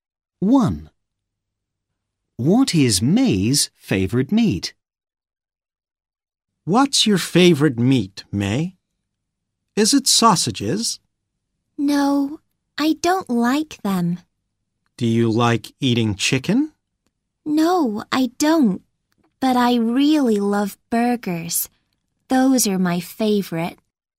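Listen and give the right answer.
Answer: burgers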